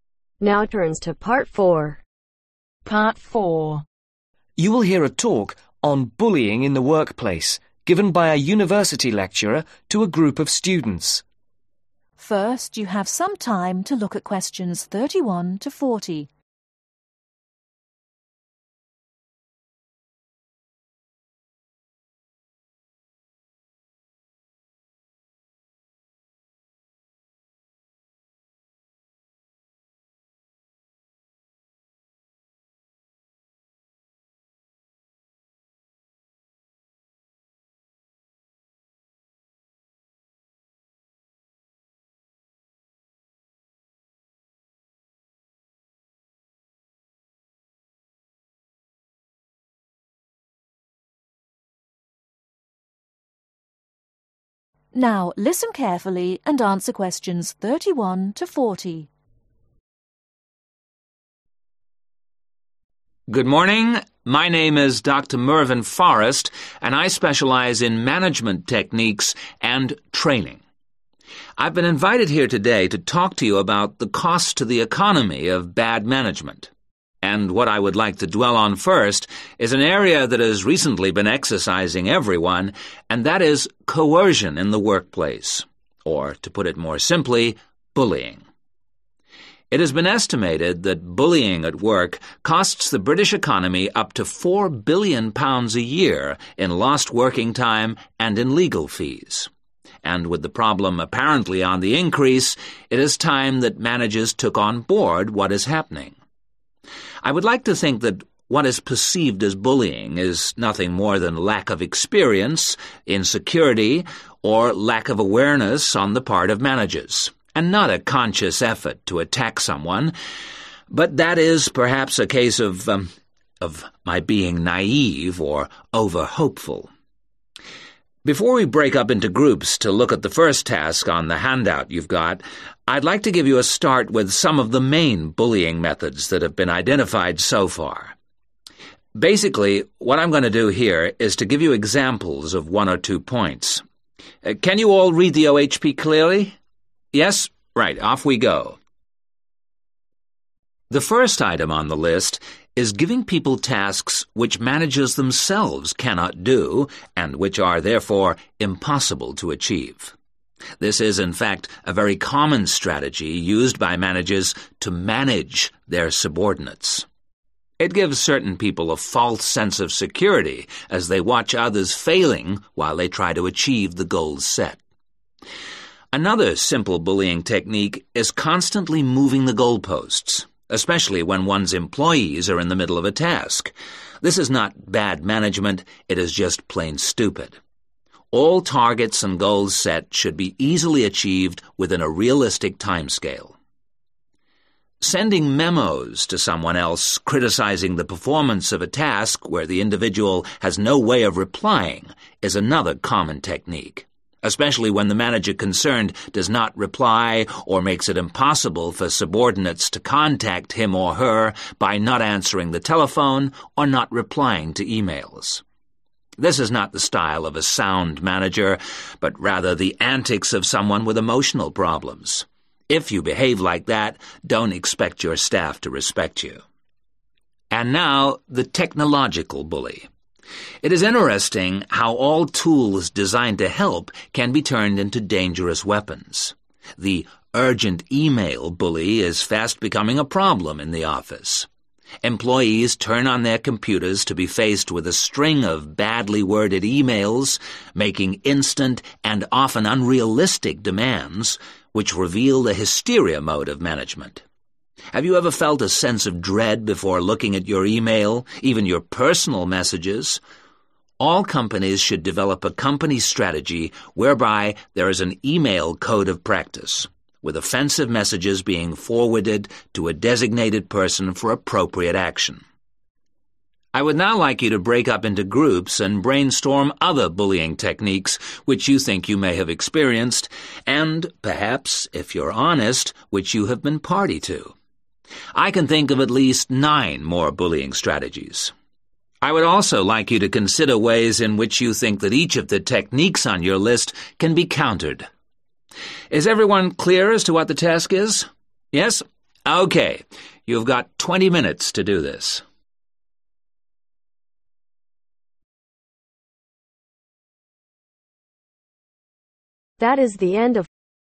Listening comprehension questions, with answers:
Complete the information below. Write ONE WORD ONLY for each answer.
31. Notes: The speaker specializes in management techniques and (31)............ .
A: Training

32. Bullying in the workplace costs the British (32)............ up to £4 billion a year.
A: Economy

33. - a lack of (33)............ on the part of managers.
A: Awareness

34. - setting (34)............ tasks.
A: Impossible

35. - stopping individuals (35)............ to criticism.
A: Replying/Responding

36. - Not answering the (36)........... or replying to e-mails.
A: Telephone

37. This means you cannot expect your staff to (37)............ you.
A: Respect

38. - Using technology. Companies should develop an (38)............ code of practice.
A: e-mail/email

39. In groups (39)............ other bullying strategies and ways in which they can be (40)............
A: Brainstorm

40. In groups (39)............ other bullying strategies and ways in which they can be (40)............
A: Countered